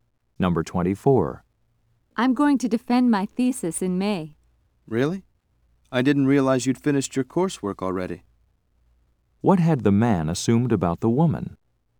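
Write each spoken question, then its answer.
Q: What had the man assumed about the woman?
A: That she hadn't finished her coursework.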